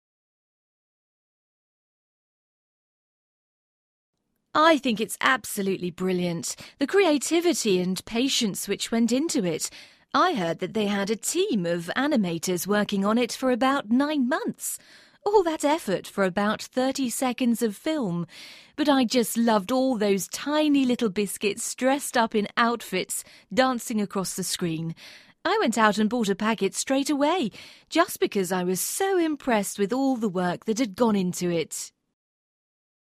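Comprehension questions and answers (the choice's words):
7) What is the woman talking about?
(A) an advert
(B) a movie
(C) a cartoon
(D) a ballet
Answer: an advert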